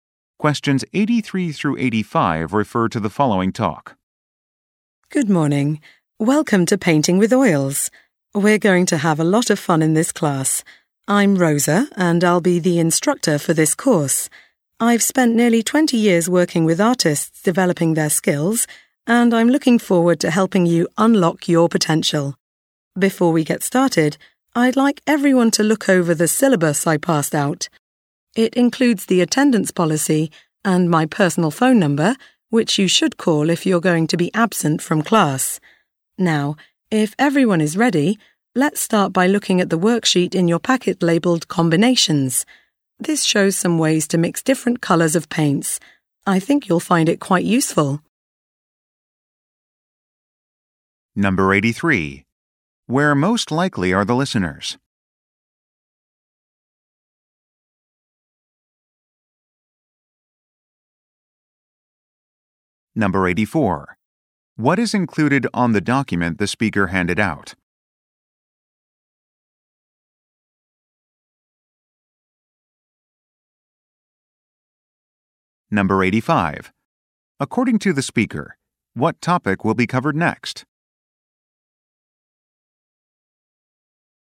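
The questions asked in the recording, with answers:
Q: Where most likely are the listeners?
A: In an oil painting class

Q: What is included on the document the speaker handed out?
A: The attendance policy and the instructor's phone number

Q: According to the speaker, what topic will be covered next?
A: Ways to mix different colors of paint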